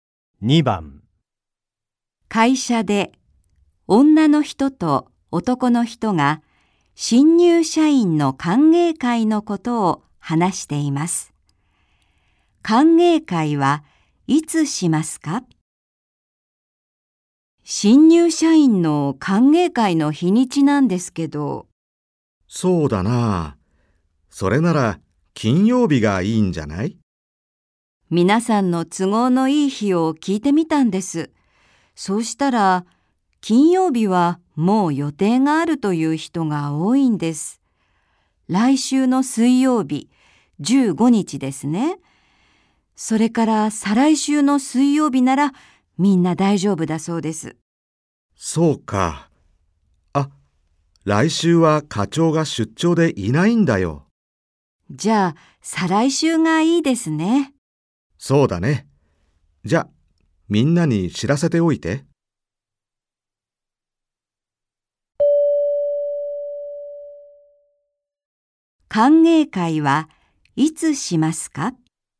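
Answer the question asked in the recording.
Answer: 再来週の水曜日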